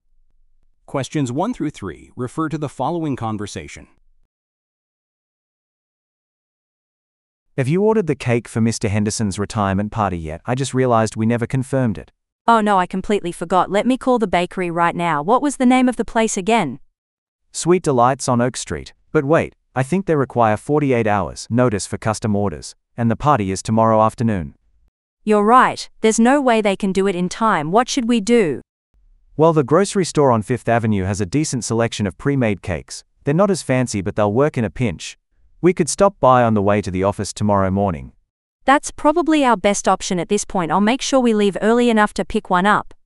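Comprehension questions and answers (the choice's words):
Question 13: What event are the speakers discussing?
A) A company merger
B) A product launch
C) A retirement celebration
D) A job interview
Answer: A retirement celebration

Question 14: What is the problem?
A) The venue is unavailable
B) They missed an ordering deadline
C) The budget has been reduced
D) The guest list is too long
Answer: They missed an ordering deadline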